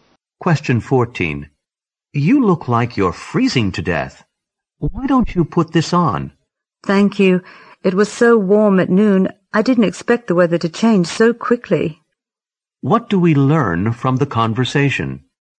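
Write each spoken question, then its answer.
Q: What do we learn from the conversation?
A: The weather turned cold suddenly, and the woman is feeling very cold.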